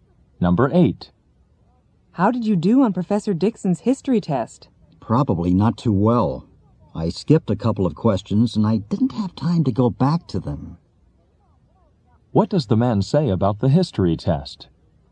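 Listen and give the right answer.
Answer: He probably didn't do well; he skipped questions and didn't finish them.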